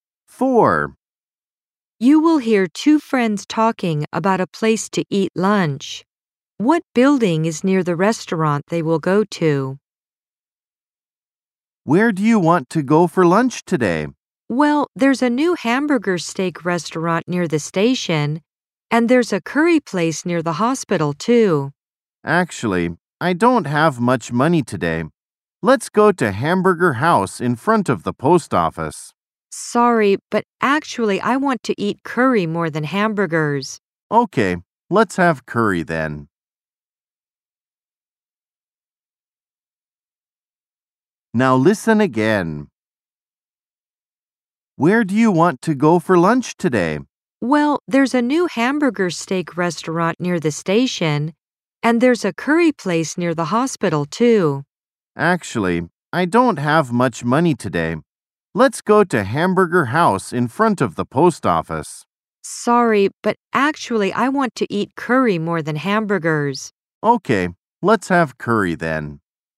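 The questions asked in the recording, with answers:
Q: What building is near the restaurant they will go to?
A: The hospital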